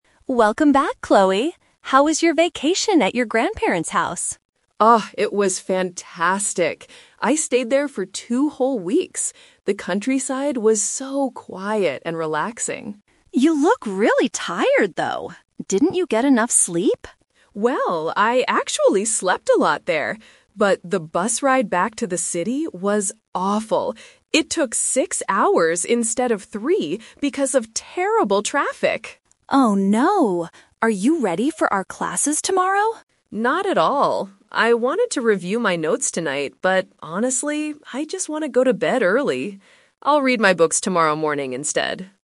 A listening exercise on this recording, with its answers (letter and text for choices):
Listen to the conversation between two roommates. Choose the correct answer (A, B, or C) for each question.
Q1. What did Chloe like about her vacation?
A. The exciting city life.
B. The quiet countryside.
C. The long bus ride.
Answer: B. The quiet countryside.

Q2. Why is Chloe feeling tired right now?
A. She did not sleep much during her vacation.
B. She studied all night for her classes.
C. She was in heavy traffic for a long time.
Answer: C. She was in heavy traffic for a long time.

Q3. What is Chloe going to do tonight?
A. Go to sleep early.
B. Read her books for class.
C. Travel back to the countryside.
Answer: A. Go to sleep early.

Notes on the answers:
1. Chloe says, "The countryside was so quiet and relaxing." Why the traps are wrong: Option (A) is incorrect because she went to the countryside, not the city, for her vacation. Option (C) is a trap; she mentions the bus ride, but she says it was "awful," not something she liked.
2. Chloe explains that the bus ride took six hours because of "terrible traffic." Why the traps are wrong: Option (A) is a trap using the word "sleep." Emma asks if she didn't get enough sleep, but Chloe says, "I actually slept a lot there." Option (B) is incorrect because she hasn't started studying yet.
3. Chloe says, "I just want to go to bed early." Why the traps are wrong: Option (B) is the main "twist" trap. She initially wanted to review her notes tonight, but changed her mind and will read her books "tomorrow morning instead." Option (C) is logically incorrect since she just returned from there.

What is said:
Emma: Welcome back, Chloe! How was your vacation at your grandparents' house?
Chloe: Oh, it was fantastic. I stayed there for two whole weeks. The countryside was so quiet and relaxing.
Emma: You look really tired, though. Didn't you get enough sleep?
Chloe: Well, I actually slept a lot there. But the bus ride back to the city was awful. It took six hours instead of three because of terrible traffic!
Emma: Oh no. Are you ready for our classes tomorrow?
Chloe: Not at all. I wanted to review my notes tonight, but honestly, I just want to go to bed early. I'll read my books tomorrow morning instead.